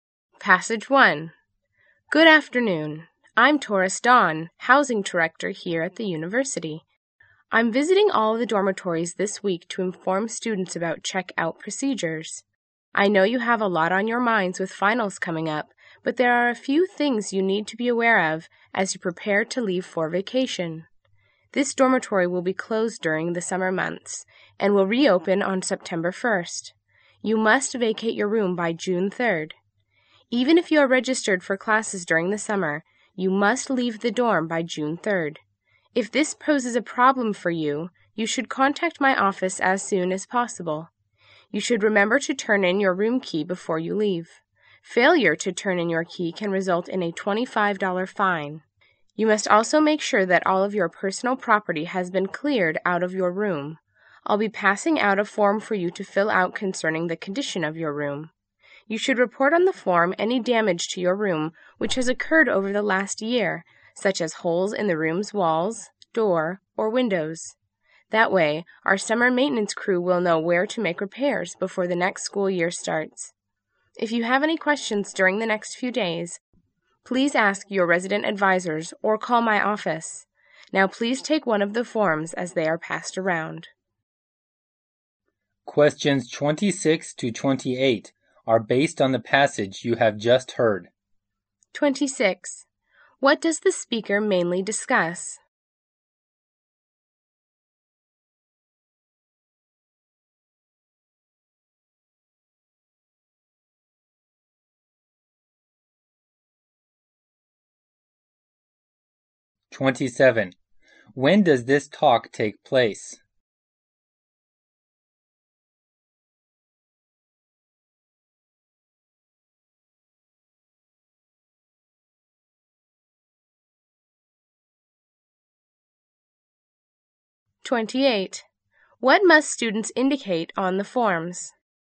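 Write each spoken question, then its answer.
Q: What does the speaker mainly discuss?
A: The checkout procedures for the dormitory.

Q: When does this talk take place?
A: Just before final exams, at the end of the school year.

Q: What must students indicate on the forms?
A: Any damage to their rooms.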